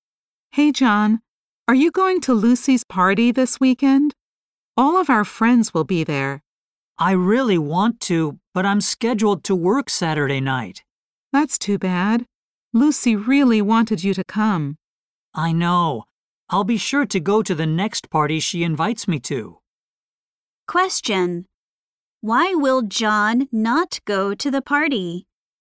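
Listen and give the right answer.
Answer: He has to work Saturday night.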